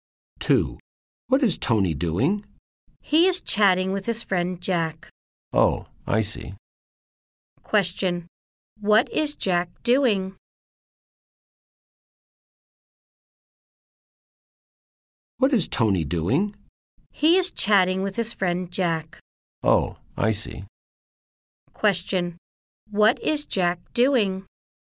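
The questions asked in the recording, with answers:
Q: What is Jack doing?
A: He is chatting with Tony.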